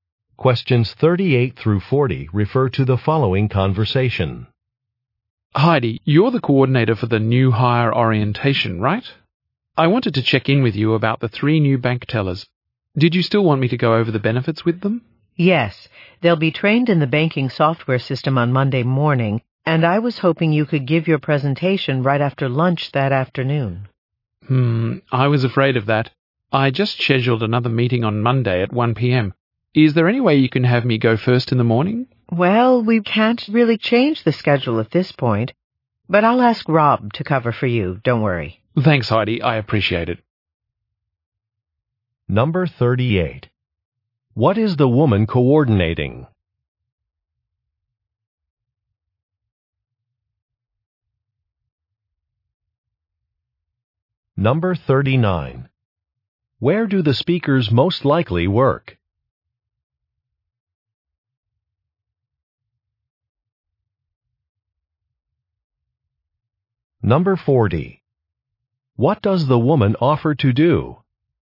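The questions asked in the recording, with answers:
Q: What is the woman coordinating?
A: A new hire orientation

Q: Where do the speakers most likely work?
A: At a bank

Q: What does the woman offer to do?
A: Ask Rob to cover for the man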